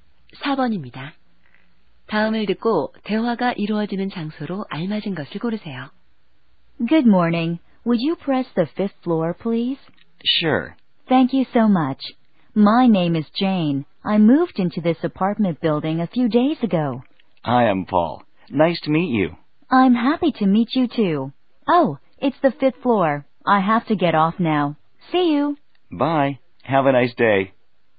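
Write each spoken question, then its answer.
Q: 다음을 듣고 대화가 이루어지는 장소로 알맞은 것을 고르세요.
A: 엘리베이터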